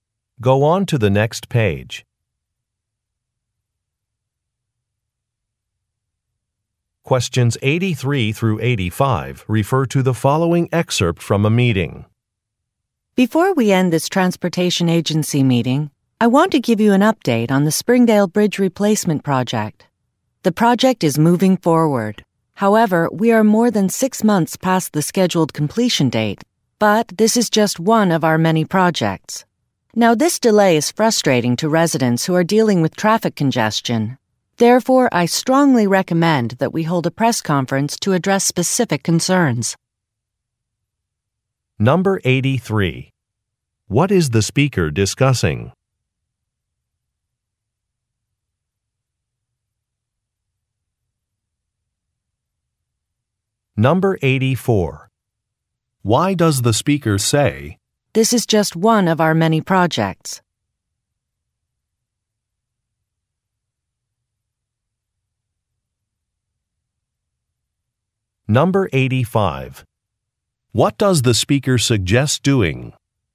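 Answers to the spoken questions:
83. The Springdale Bridge replacement project
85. Holding a press conference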